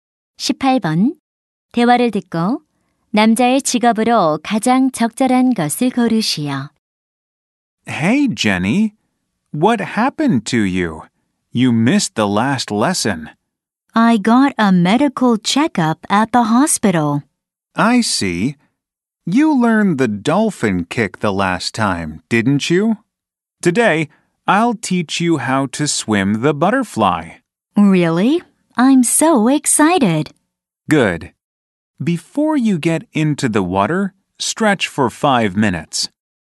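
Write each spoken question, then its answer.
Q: 대화를 듣고 남자의 직업으로 가장 적절한 것을 고르시오.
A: 수영 강사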